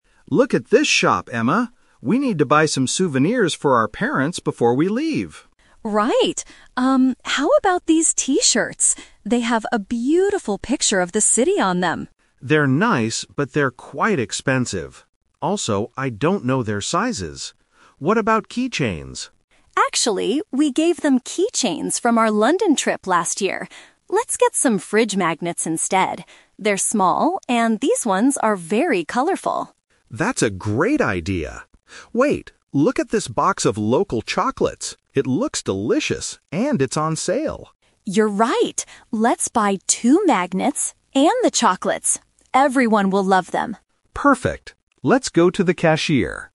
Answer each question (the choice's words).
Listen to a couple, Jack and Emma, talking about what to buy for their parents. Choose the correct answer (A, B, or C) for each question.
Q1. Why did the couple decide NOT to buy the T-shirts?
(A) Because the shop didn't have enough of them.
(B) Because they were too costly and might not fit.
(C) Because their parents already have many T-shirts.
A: Because they were too costly and might not fit.

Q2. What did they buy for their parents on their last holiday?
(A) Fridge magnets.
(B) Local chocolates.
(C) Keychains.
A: Keychains.

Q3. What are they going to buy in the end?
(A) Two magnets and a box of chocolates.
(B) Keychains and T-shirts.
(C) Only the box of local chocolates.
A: Two magnets and a box of chocolates.

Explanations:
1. Jack says the T-shirts are "quite expensive" (costly) and he "doesn't know their sizes" (might not fit). Option (A) and (C) are not mentioned.
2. Emma says, "Actually, we gave them keychains from our London trip last year." This is a trap because keychains are mentioned as a possibility for this trip, but they were actually the gift from last year.
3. This is the Twist. They first talk about T-shirts and keychains, then agree on magnets, but finally decide to get "two magnets and the chocolates." Option (C) is a trap because the chocolates were the last thing mentioned, but they are buying them together with the magnets.

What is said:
Jack: Look at this shop, Emma! We need to buy some souvenirs for our parents before we leave.
Emma: Right. how about these T-shirts? They have a beautiful picture of the city on them.
Jack: They're nice, but they're quite expensive. Also, I don't know their sizes. What about keychains?
Emma: Actually, we gave them keychains from our London trip last year. Let's get some fridge magnets instead. They're small, and these ones are very colorful.
Jack: That's a great idea! Wait... look at this box of local chocolates. It looks delicious, and it's on sale.
Emma: You're right. Let's buy two magnets and the chocolates. Everyone will love them.